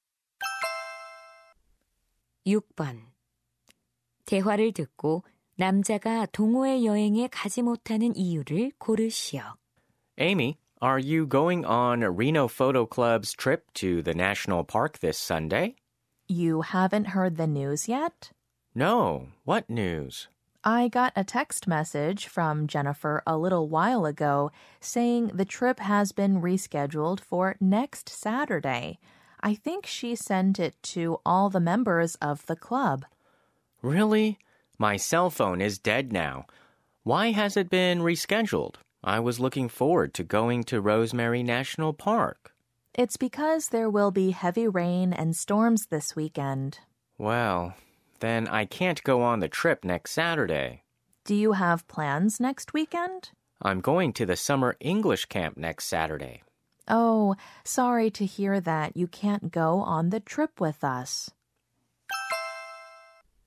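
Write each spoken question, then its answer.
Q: 대화를 듣고 남자가 동호회 여행에 가지 못하는 이유를 고르시오.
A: 다음 주 토요일에 여름 영어 캠프에 가기 때문에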